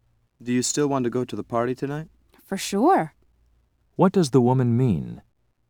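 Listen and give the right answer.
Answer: She definitely still wants to go to the party.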